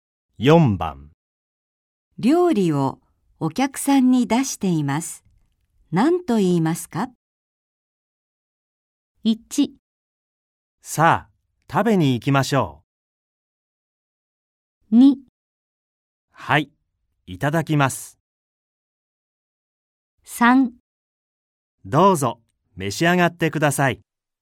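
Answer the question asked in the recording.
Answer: 3: どうぞ、召し上がってください。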